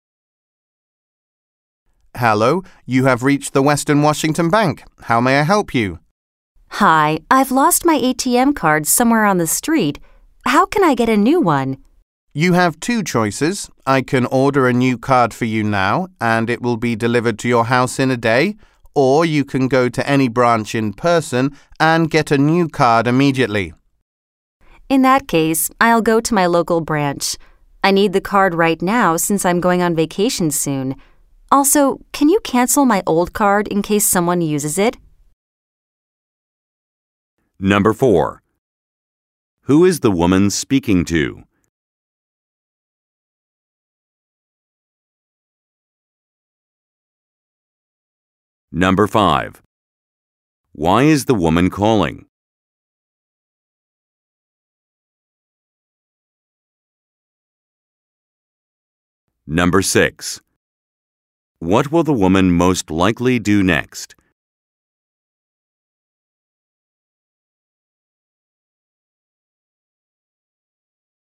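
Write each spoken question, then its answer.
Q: Who is the woman speaking to?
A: A bank employee at Western Washington Bank

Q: Why is the woman calling?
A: She lost her ATM card and needs a new one

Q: What will the woman most likely do next?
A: Go to her local bank branch to get a new card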